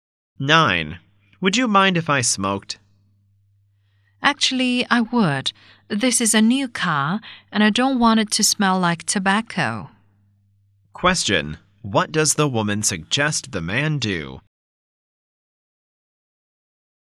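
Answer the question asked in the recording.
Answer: Not smoke in the car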